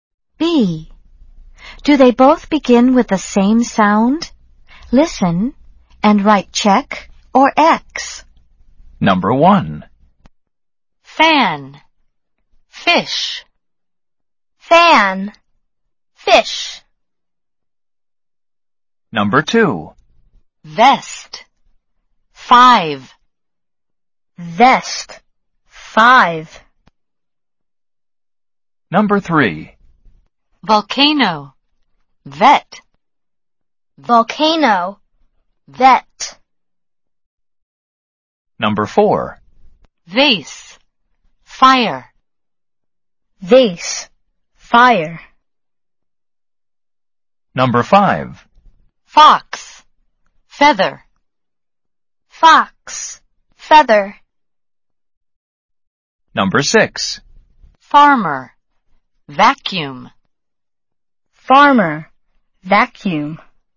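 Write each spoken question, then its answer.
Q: Do they both begin with the same sound?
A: Yes (fan, fish)

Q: Do they both begin with the same sound?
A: No (vest, five)

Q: Do they both begin with the same sound?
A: Yes (volcano, vet)

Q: Do they both begin with the same sound?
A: No (vase, fire)

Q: Do they both begin with the same sound?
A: Yes (fox, feather)

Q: Do they both begin with the same sound?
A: No (farmer, vacuum)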